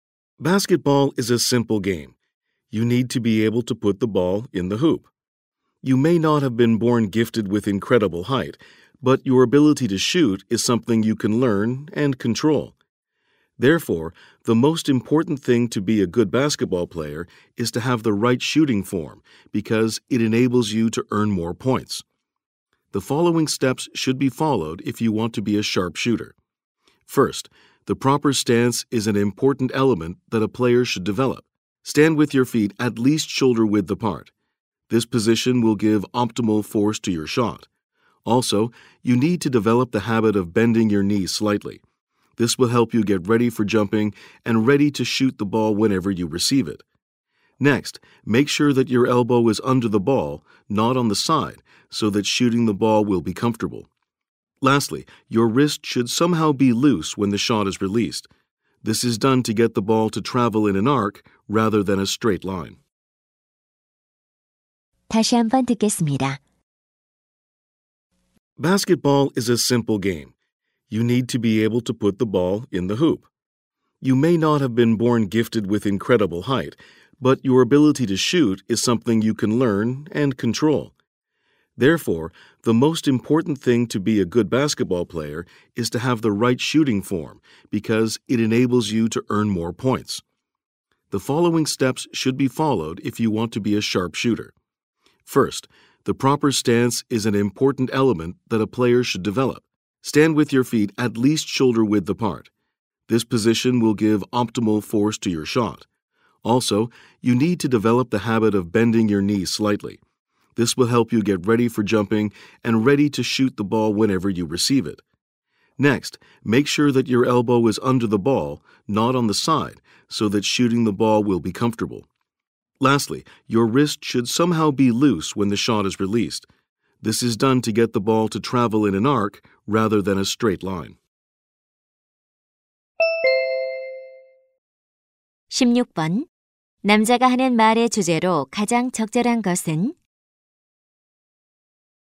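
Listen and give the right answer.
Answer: 농구에서 슛을 잘 하기 위한 올바른 자세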